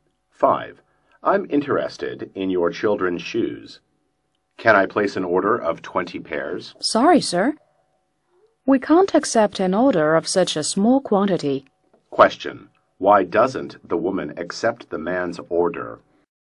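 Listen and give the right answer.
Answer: The quantity is too small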